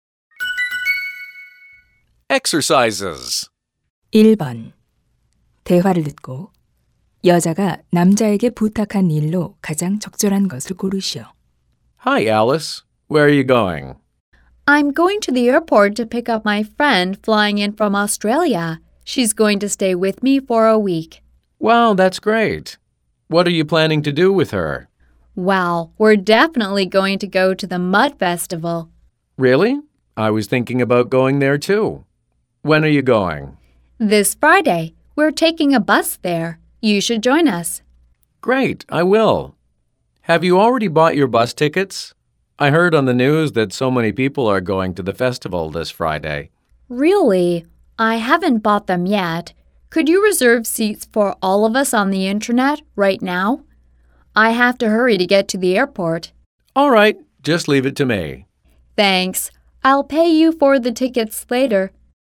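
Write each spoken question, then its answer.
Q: 대화를 듣고 여자가 남자에게 부탁한 일로 가장 적절한 것을 고르시오.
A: 인터넷으로 버스 좌석 예약하기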